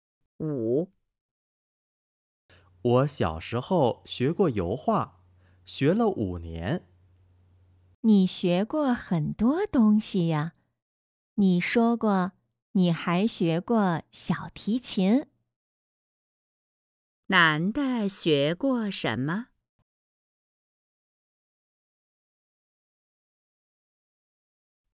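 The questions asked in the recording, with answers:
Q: 男的学过什么?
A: 油画和小提琴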